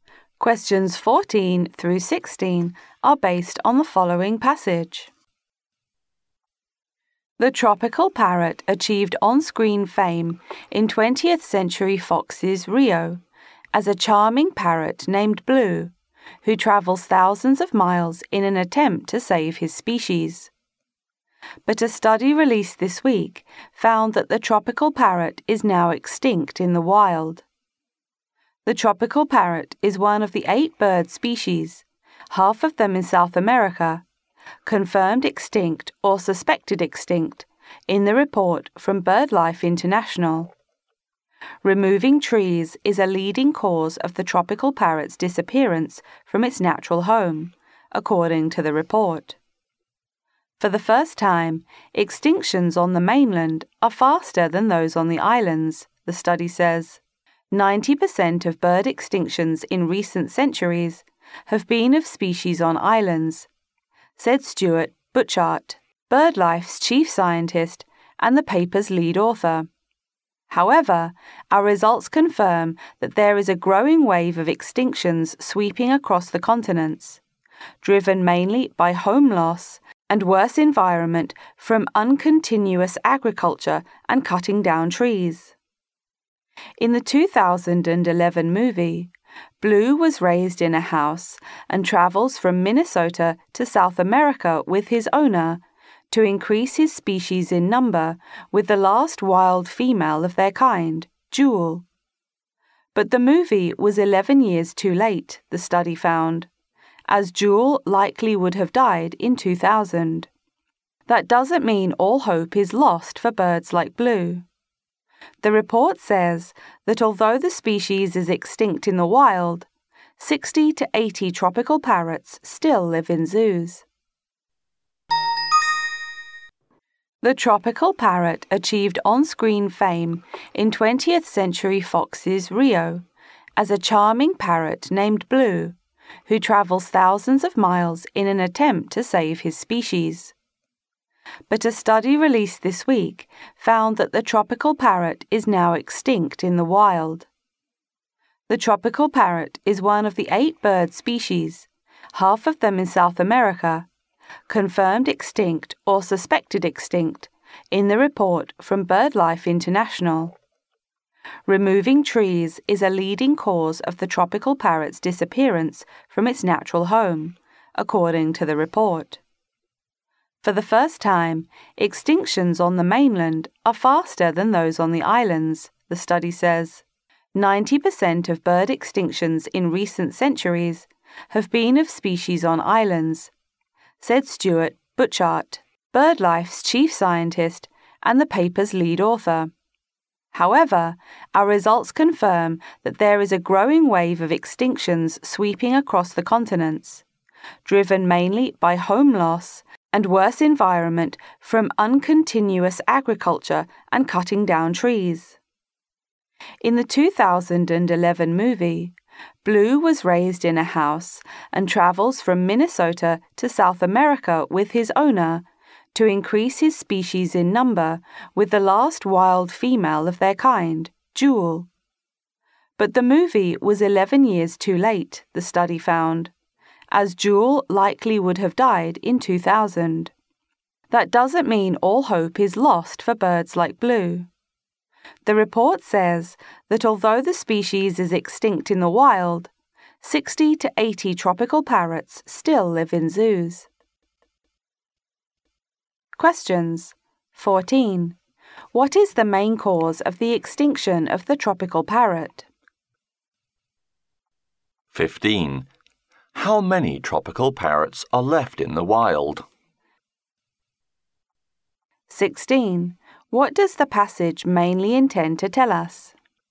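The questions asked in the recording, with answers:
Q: What is the main cause of the extinction of the tropical parrot?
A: Removing trees

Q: How many tropical parrots are left in the wild?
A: None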